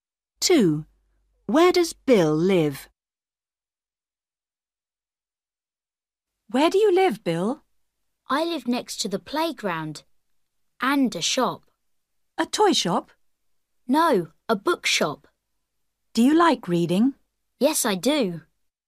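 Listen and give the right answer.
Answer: next to the playground and a bookshop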